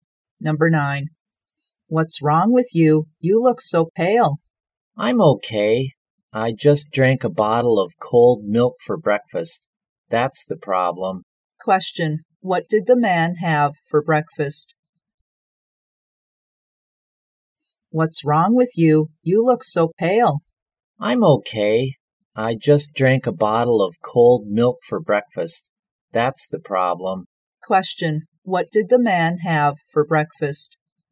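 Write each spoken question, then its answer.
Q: What did the man have for breakfast?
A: A bottle of cold milk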